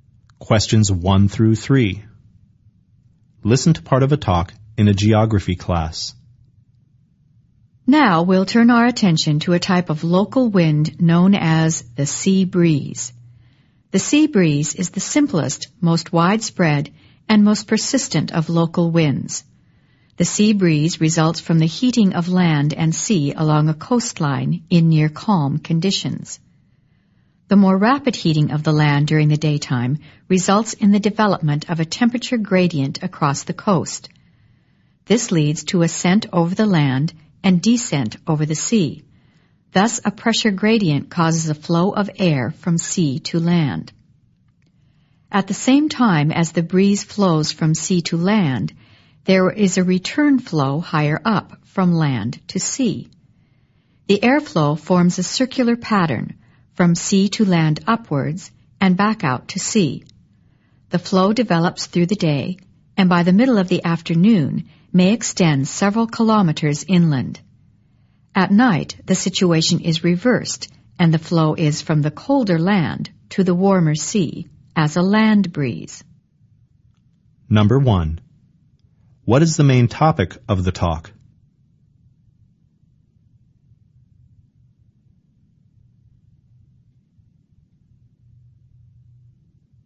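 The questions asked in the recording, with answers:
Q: What is the main topic of the talk?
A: The sea breeze, a type of local wind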